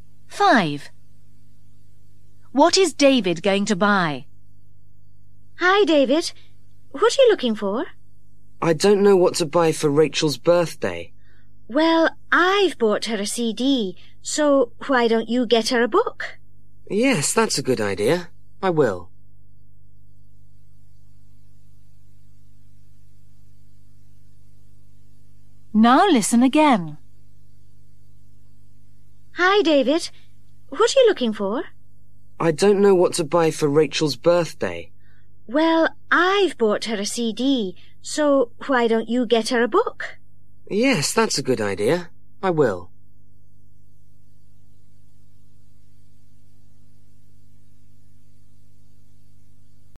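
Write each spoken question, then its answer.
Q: What is David going to buy?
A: A book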